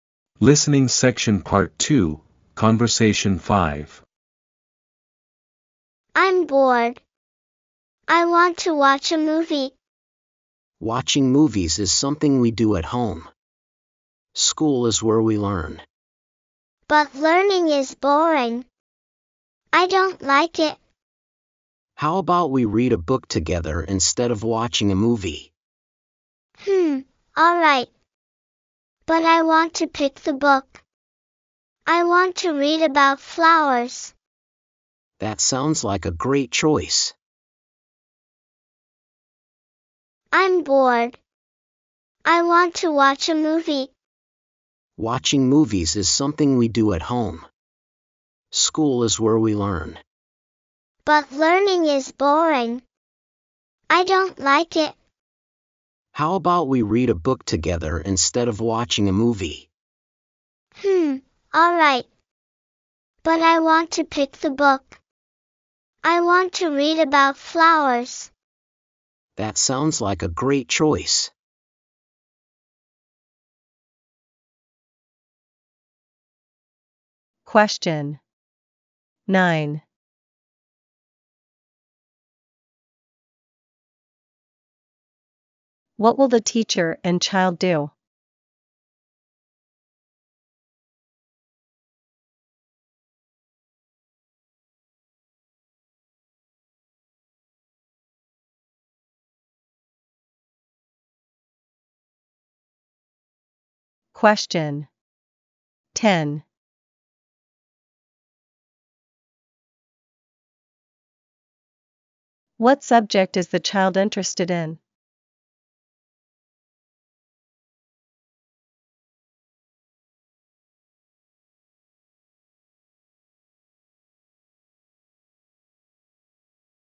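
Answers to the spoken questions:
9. Read a book together
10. Flowers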